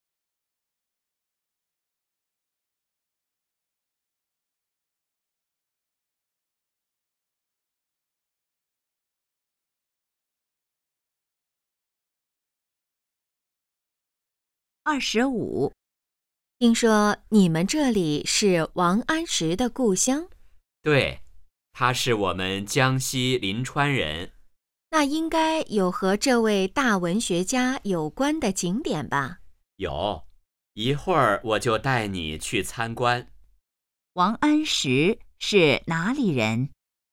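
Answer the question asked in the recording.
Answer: 江西临川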